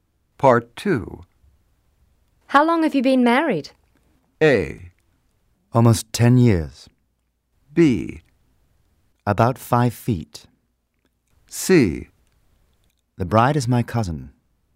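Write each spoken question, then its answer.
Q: How long have you been married?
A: A: Almost 10 years.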